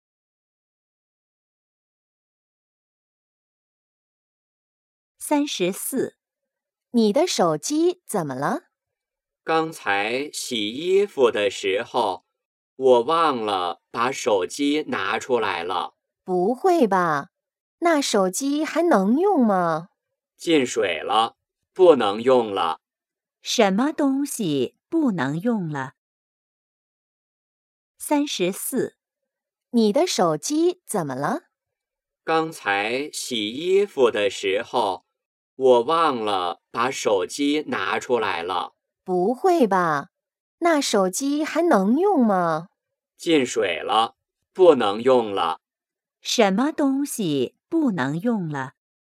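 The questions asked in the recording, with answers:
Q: 什么东西不能用了?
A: 手机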